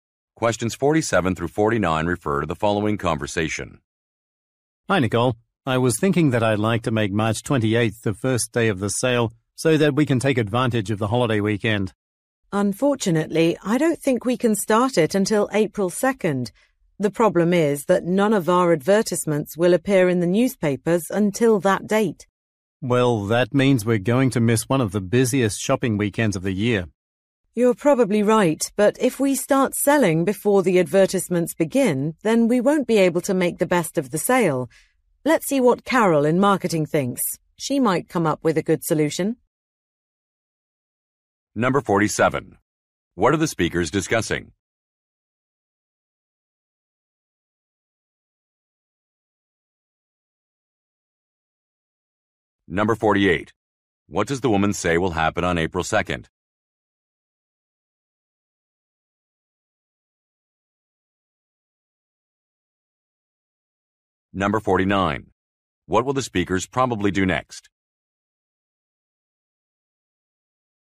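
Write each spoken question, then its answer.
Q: What are the speakers discussing?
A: The start date of a sale

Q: What does the woman say will happen on April 2nd?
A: The advertisements will appear in newspapers

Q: What will the speakers probably do next?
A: Ask Carol in marketing for her opinion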